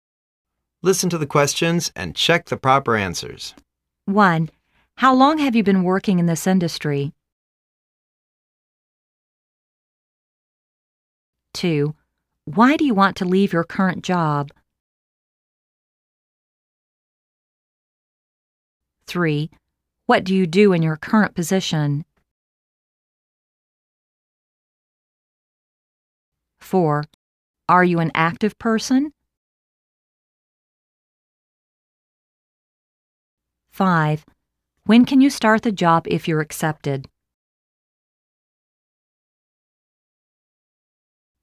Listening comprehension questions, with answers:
Listen to the questions and check the proper answers.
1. How long have you been working in this industry?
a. Three years since I graduated from college.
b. Two hours walking.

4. Are you an active person?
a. I like to get along with active people.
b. Partly, sometimes l'm very quiet.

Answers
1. a. Three years since I graduated from college.
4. b. Partly, sometimes l'm very quiet.

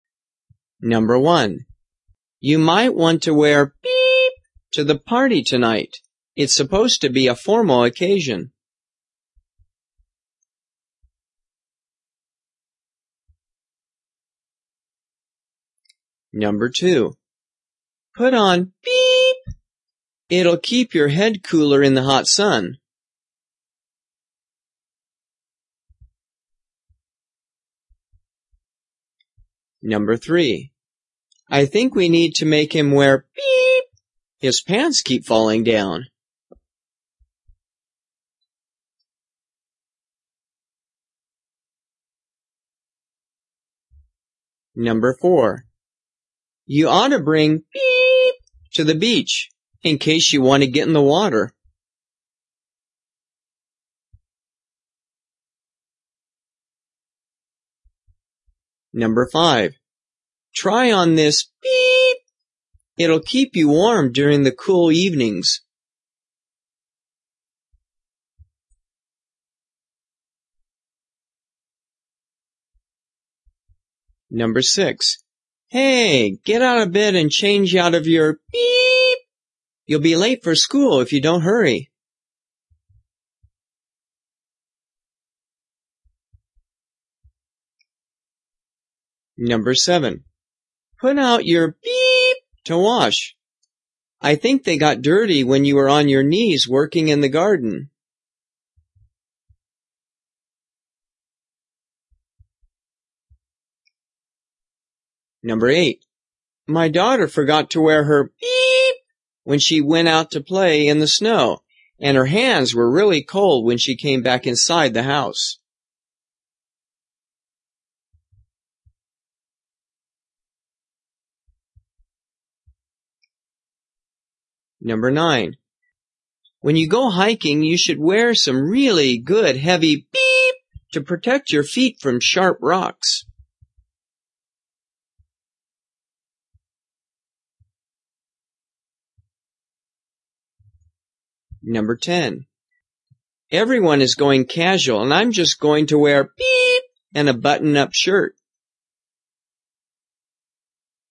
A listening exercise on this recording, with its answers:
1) You might want to wear ***BEEP*** to the party tonight. It's supposed to be a ______ occasion.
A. some jeans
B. a tie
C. a sweatshirt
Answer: B. a tie

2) Put on ***BEEP*** . It'll keep you ____________ cooler in the _____.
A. a hat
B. a shirt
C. sunglasses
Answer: A. a hat

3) I think we need to make him wear ***BEEP*** . His _________.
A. a windbreaker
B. scarf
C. a belt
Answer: C. a belt

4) You ought to bring ***BEEP*** to the __________ in case you want to ______________.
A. a swimming suit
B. jacket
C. a t-shirt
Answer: A. a swimming suit

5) Try on this ***BEEP*** . It'll keep you _______________________.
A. necklace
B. slip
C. sweater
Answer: C. sweater

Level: 初级

